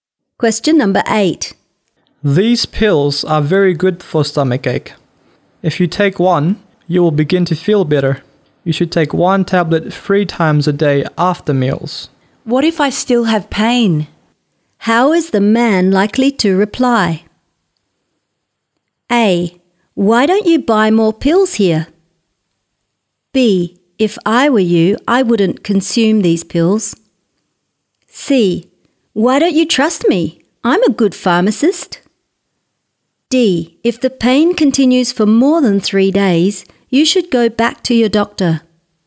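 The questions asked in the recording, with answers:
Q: How is the man likely to reply?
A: D: If the pain continues for more than 3 days, you should go back to your doctor.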